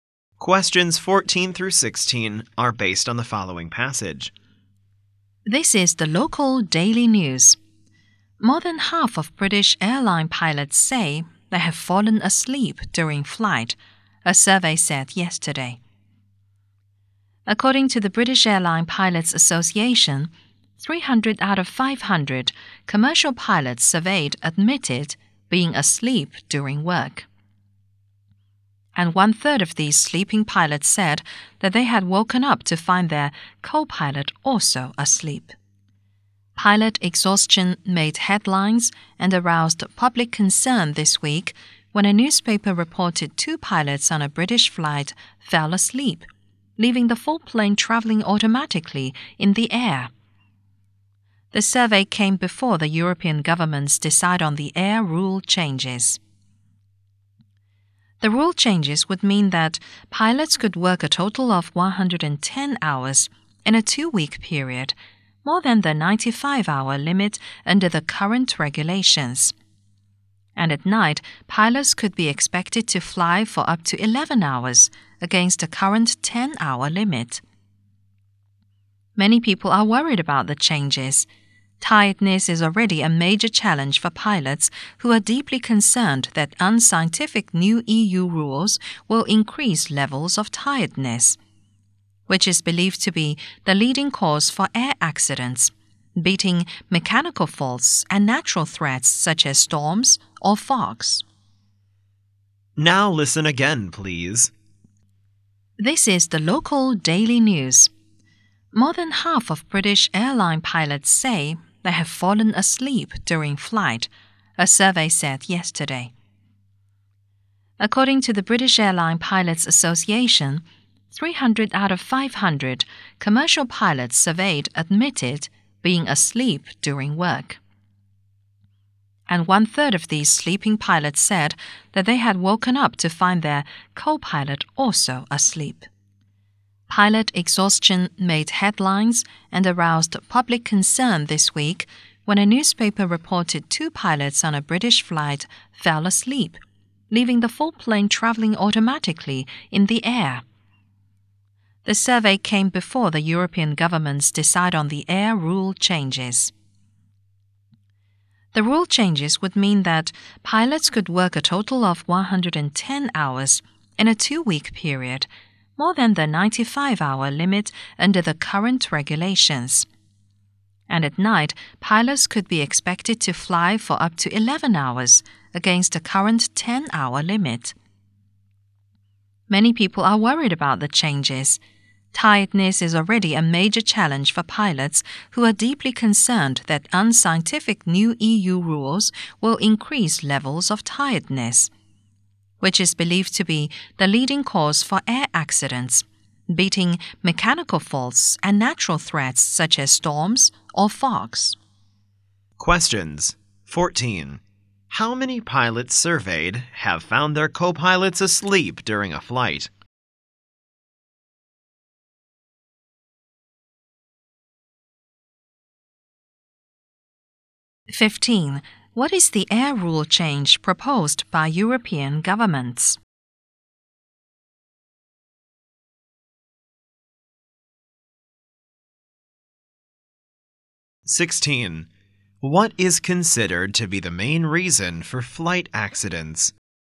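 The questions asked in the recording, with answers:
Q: How many pilots surveyed have found their co-pilots asleep during a flight?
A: 100

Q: What is the air rule change proposed by European governments?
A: Allowing pilots longer working hours (110 hours in two weeks, 11 hours at night)

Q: What is considered to be the main reason for flight accidents?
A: Pilot tiredness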